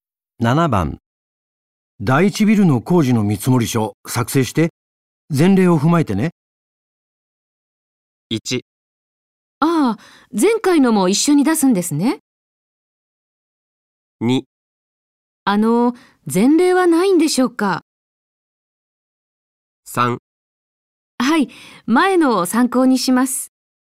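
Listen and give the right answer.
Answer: 3: はい、前のを参考にします。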